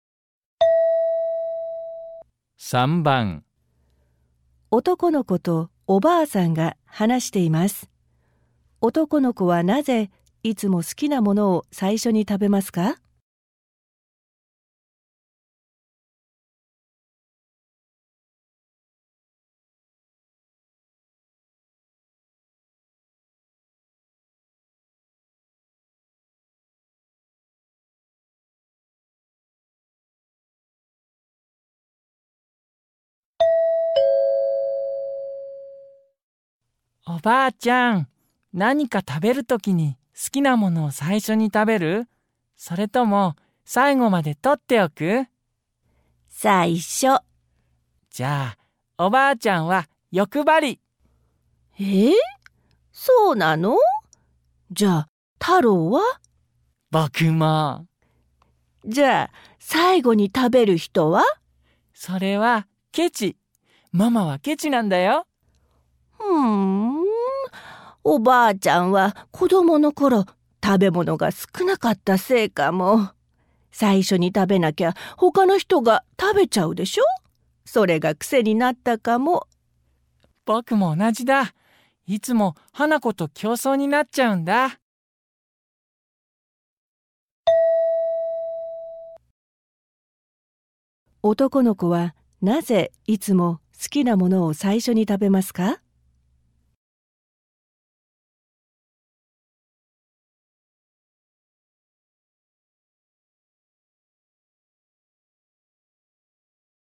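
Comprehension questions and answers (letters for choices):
問題2では、まず質問を聞いてください。そのあと、問題用紙のせんたくしを読んでください。読む時間があります。それから話を聞いて、問題用紙の1から4の中から、最もよいものを一つ選んでください。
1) 男の子はなぜいつも好きな物を最初に食べますか。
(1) 欲張りだから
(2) けちだから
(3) 食べる物がないから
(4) 花子に取られちゃうから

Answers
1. 4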